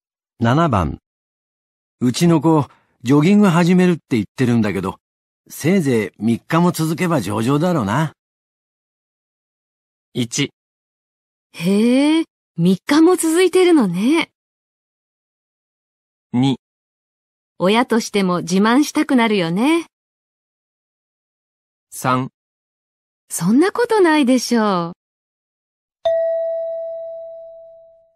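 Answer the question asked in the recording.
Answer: 3: そんなことないでしょう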